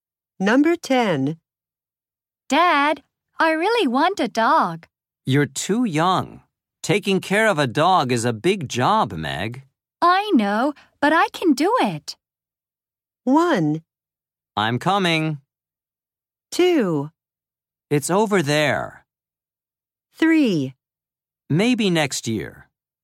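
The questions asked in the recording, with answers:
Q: I know, but I can do it.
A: 3: Maybe next year.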